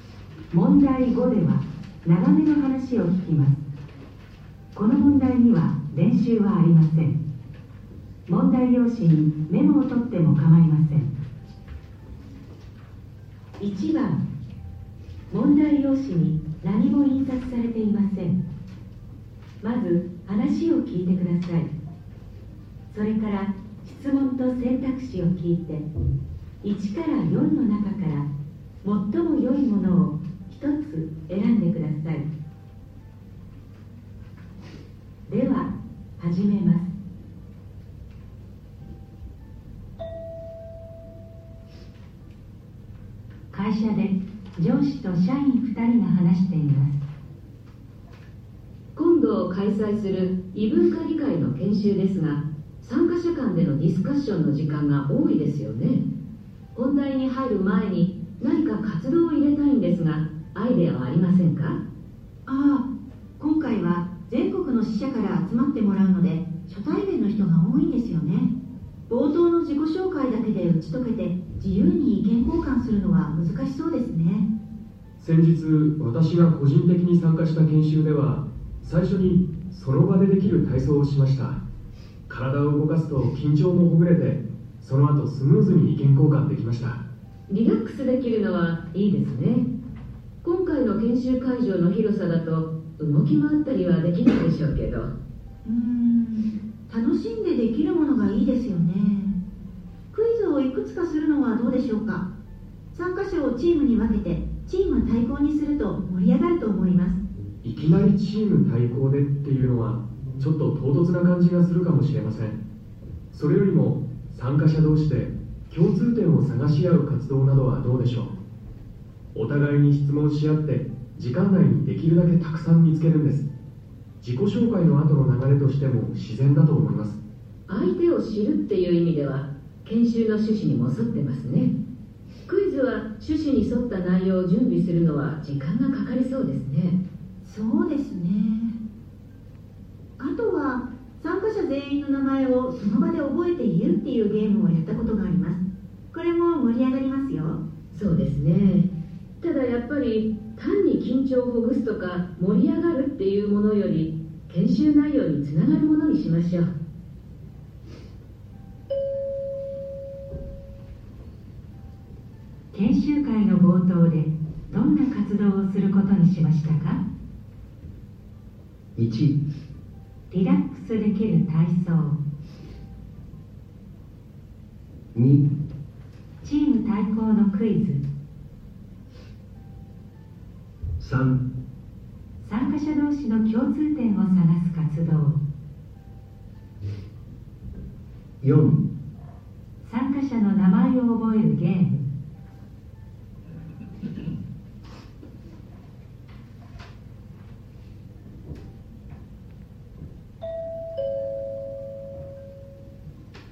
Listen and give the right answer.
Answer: 3

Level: N1 Listening · Test 1